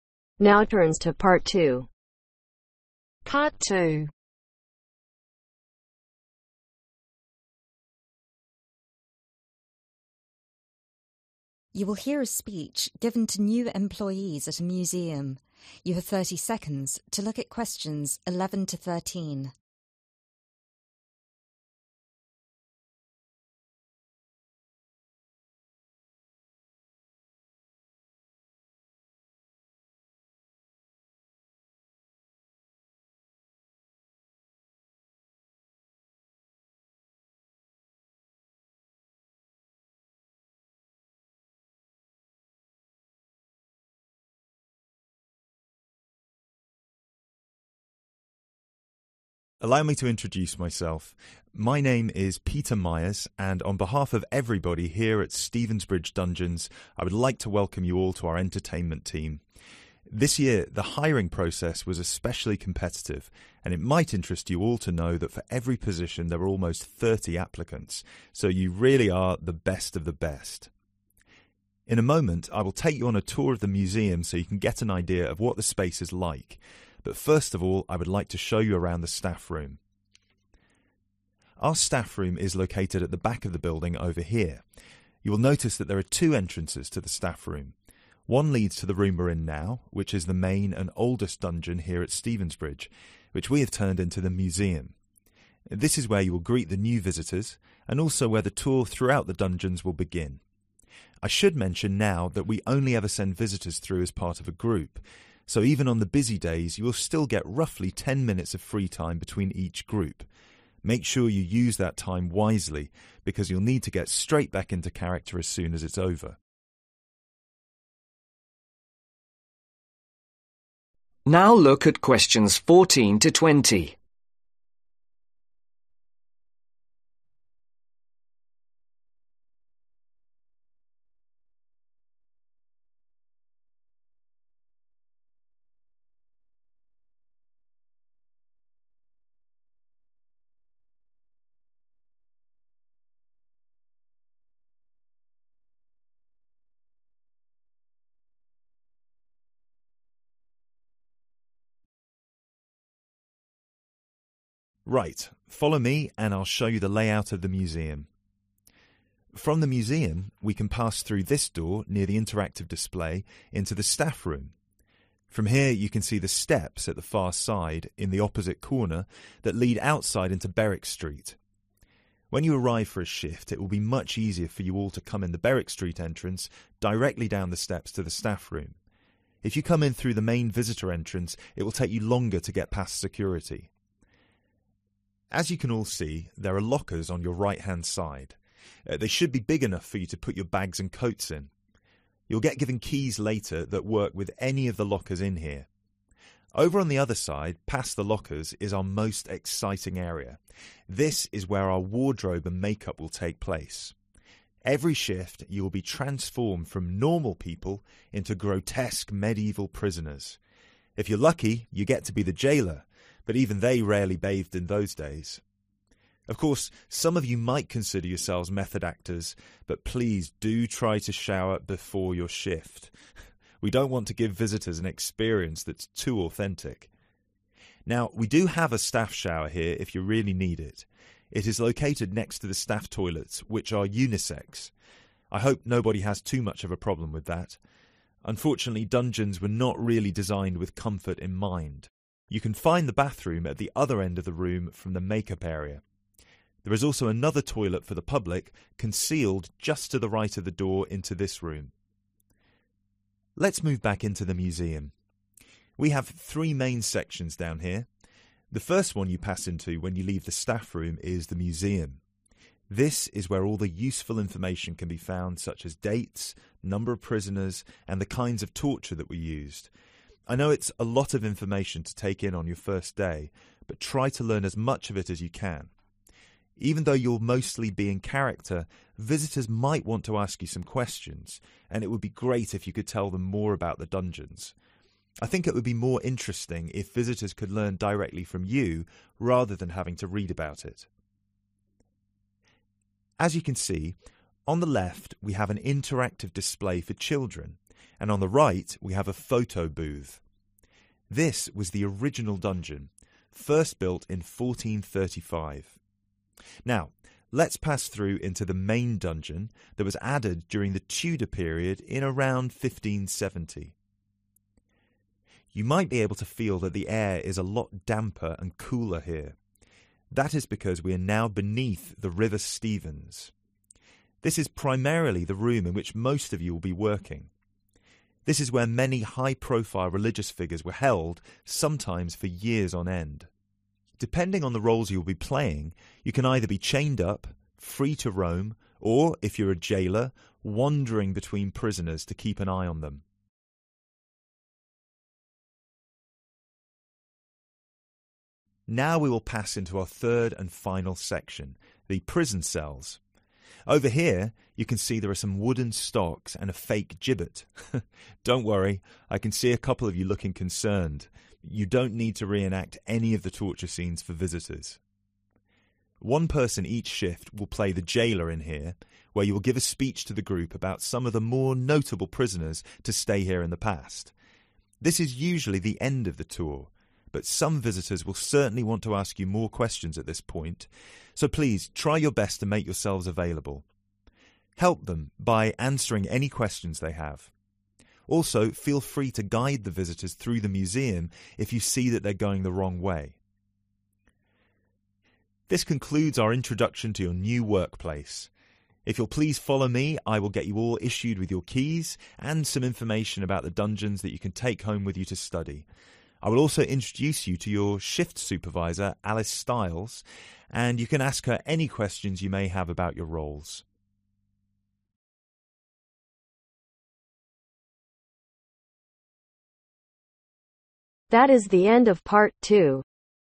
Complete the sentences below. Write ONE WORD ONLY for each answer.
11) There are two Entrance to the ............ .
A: Staff room

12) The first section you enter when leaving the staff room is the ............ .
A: Museum

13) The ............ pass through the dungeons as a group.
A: Visitors